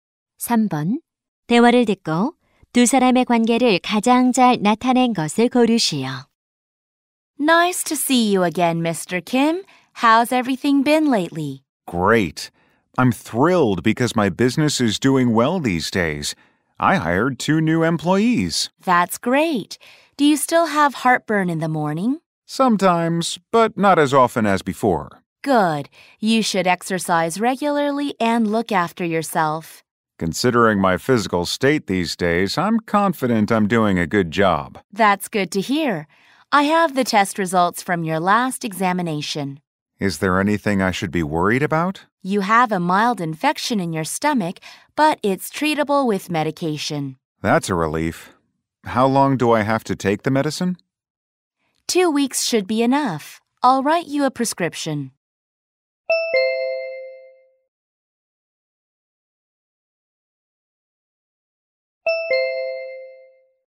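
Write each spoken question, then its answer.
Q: 대화를 듣고 두 사람의 관계를 가장 잘 나타낸 것을 고르시오.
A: 의사와 환자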